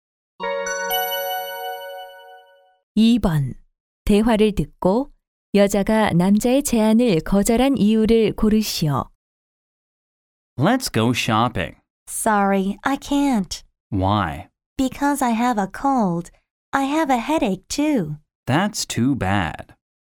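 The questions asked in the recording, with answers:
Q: 대화를 듣고 여자가 남자의 제안을 거절한 이유를 고르시오.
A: 감기에 걸려서 (두통도 있음)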